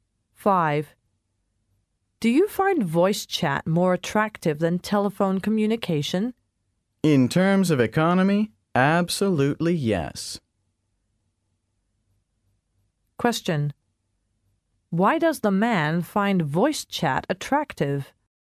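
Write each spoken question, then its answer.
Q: Why does the man find voice chat attractive?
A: It is cheaper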